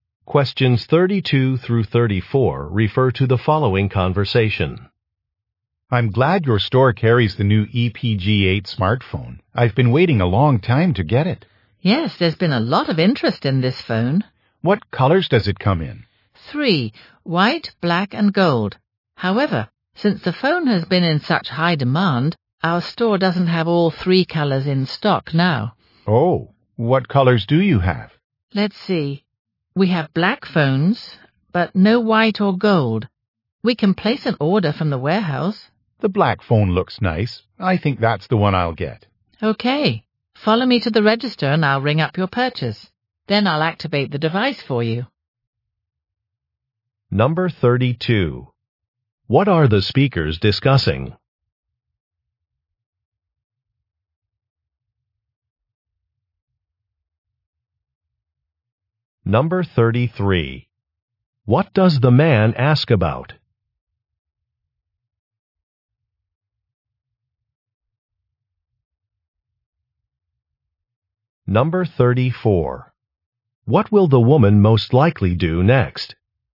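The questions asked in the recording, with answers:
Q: What are the speakers discussing?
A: A new smartphone (the EPG8)

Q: What does the man ask about?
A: What colors the phone comes in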